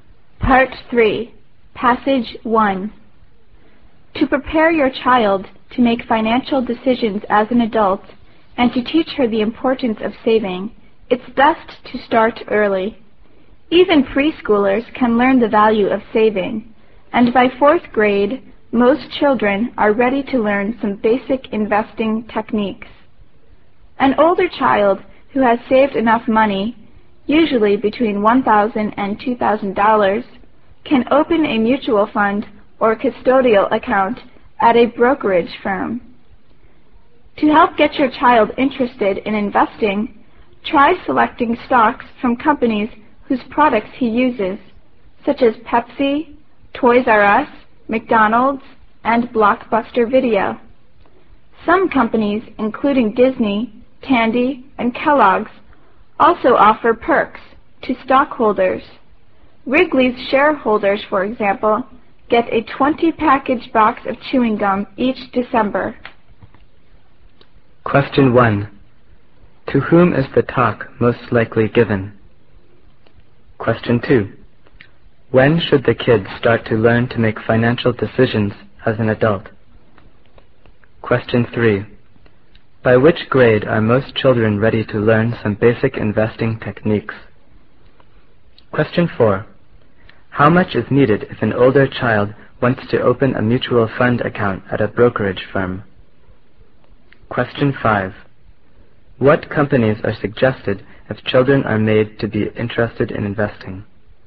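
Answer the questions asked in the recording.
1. Parents
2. Early, even as a preschooler
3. Fourth grade
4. Between $1,000 and $2,000
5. Companies whose products they use, like Pepsi, Toys R Us, McDonald's and Blockbuster Video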